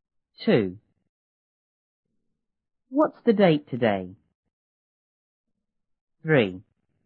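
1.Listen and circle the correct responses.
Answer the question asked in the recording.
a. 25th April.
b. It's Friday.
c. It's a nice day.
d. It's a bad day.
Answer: a. 25th April.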